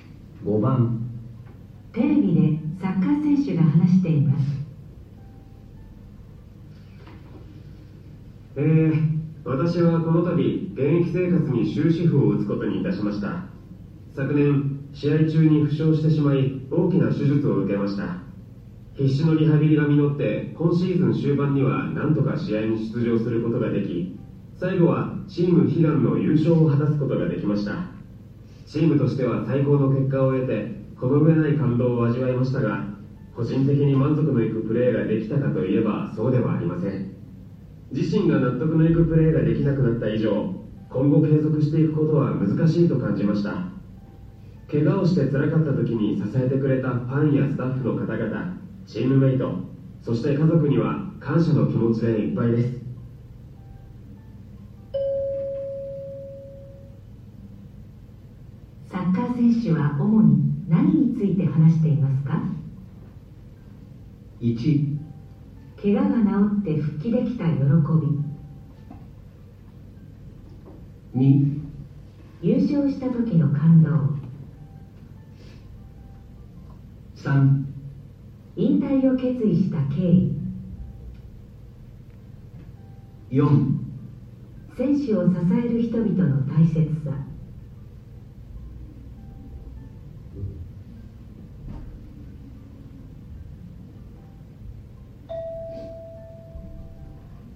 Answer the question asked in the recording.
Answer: 3

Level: N1 Listening · Test 1